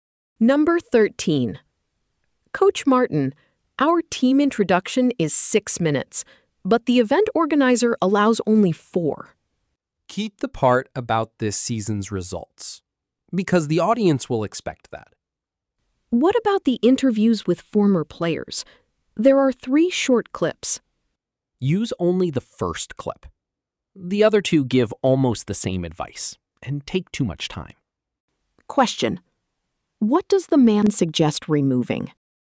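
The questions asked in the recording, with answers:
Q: what does the man suggest removing?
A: Two of the three interview clips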